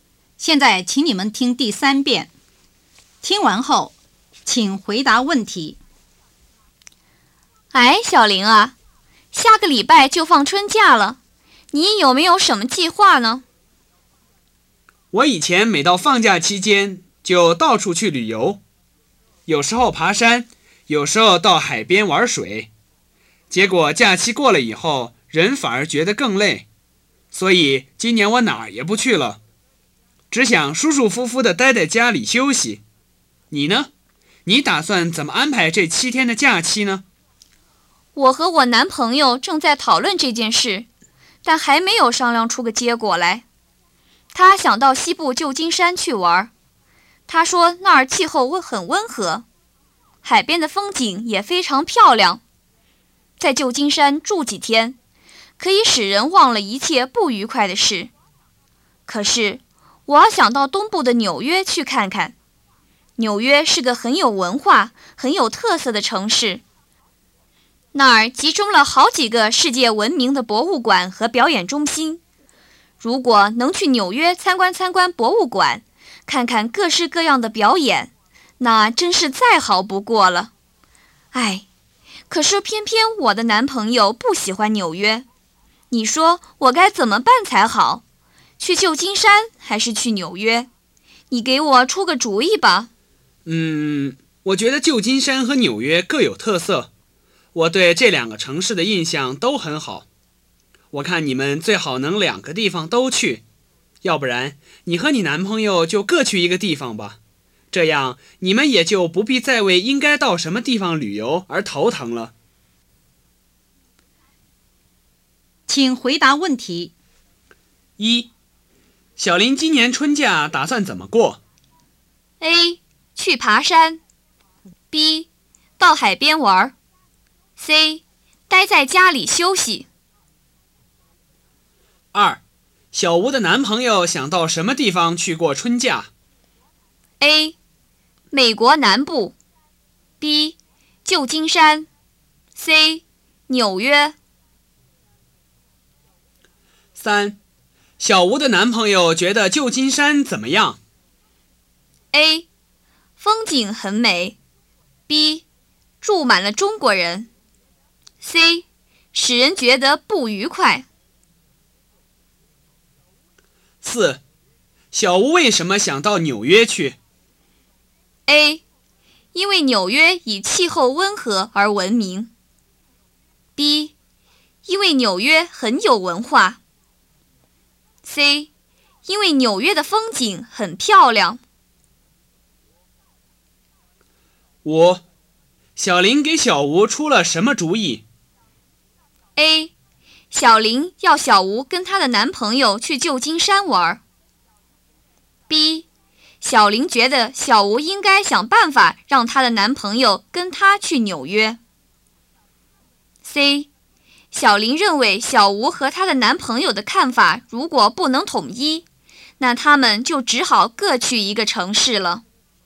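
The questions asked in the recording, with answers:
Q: 小林今年春假打算怎么过?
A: C: 待在家里休息

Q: 小吴的男朋友想到什么地方去过春假?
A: B: 旧金山

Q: 小吴的男朋友觉得旧金山怎么样?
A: A: 风景很美

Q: 小吴为什么想到纽约去?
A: B: 因为纽约很有文化

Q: 小林给小吴出了什么主意?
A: C: 小林认为小吴和她的男朋友的看法如果不能统一,那他们就只好各去一个城市了。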